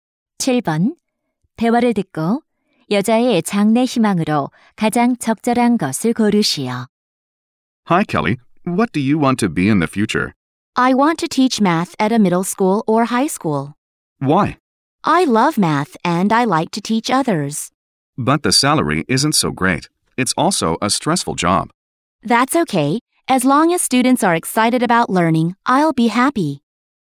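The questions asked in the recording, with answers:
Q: 대화를 듣고 여자의 장래 희망으로 가장 적절한 것을 고르시오.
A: 수학 교사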